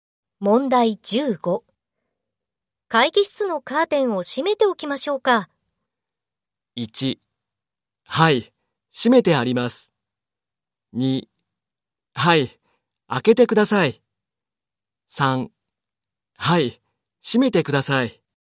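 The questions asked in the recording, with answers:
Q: 会議室のカーテンを閉めておきましょうか。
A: 3: はい、閉めてください。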